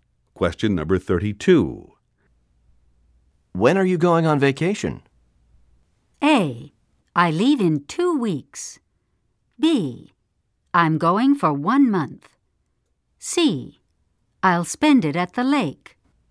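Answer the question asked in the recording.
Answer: A: I leave in 2 weeks.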